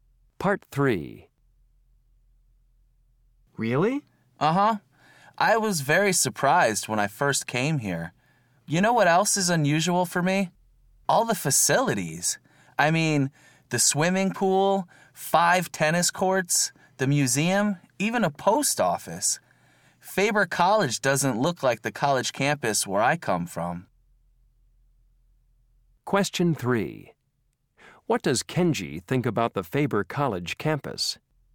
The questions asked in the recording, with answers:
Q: What does Kenji think about the Faber College campus?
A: It's completely different.